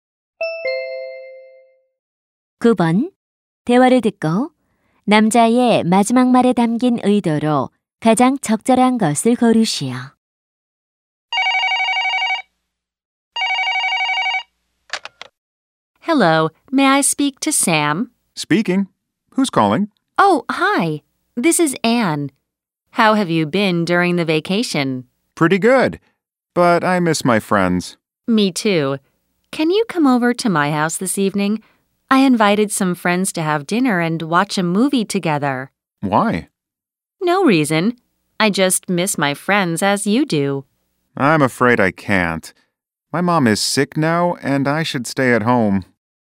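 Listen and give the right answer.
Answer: 거절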